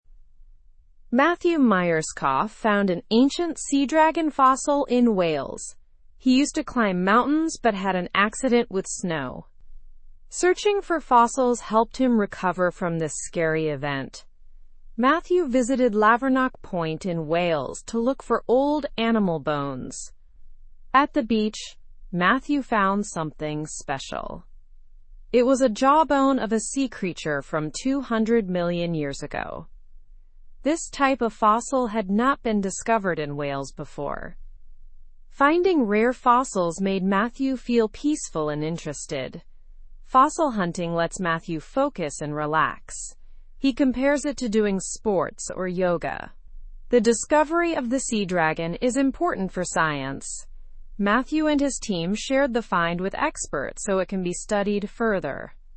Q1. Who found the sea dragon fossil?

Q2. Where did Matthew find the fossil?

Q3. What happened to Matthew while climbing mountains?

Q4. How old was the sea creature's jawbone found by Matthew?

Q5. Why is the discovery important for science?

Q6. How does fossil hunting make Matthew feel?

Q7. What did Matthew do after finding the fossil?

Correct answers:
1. Matthew Myerscough.
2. In Wales at Lavernock Point.
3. He had an accident with snow.
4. 200 million years old.
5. It is a rare find that hadn't been discovered in Wales before.
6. Peaceful and interested.
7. He shared it with experts for further study.

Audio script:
Matthew Myerscough found an ancient sea dragon fossil in Wales. He used to climb mountains but had an accident with snow. Searching for fossils helped him recover from this scary event. Matthew visited Lavernock Point in Wales to look for old animal bones. At the beach, Matthew found something special. It was a jawbone of a sea creature from 200 million years ago. This type of fossil had not been discovered in Wales before. Finding rare fossils made Matthew feel peaceful and interested. Fossil hunting lets Matthew focus and relax. He compares it to doing sports or yoga. The discovery of the sea dragon is important for science.

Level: (Level 2)